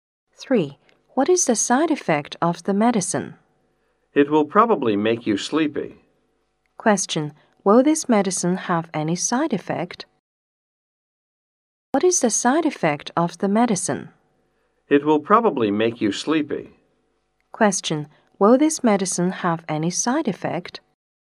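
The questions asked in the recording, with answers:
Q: Will this medicine have any side effect?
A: Yes, it will probably make you sleepy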